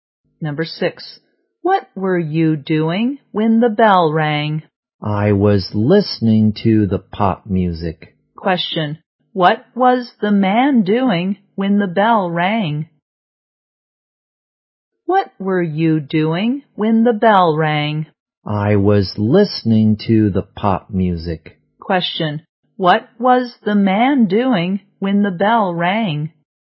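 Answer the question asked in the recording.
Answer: Listening to pop music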